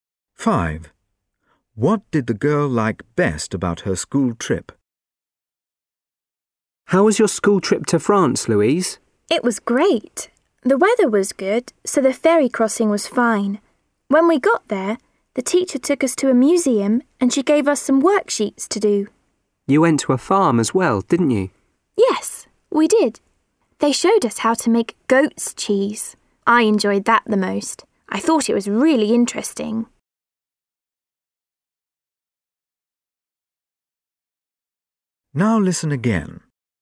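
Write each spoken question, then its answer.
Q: What did the girl like best about her school trip?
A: Visiting the farm to see goat's cheese being made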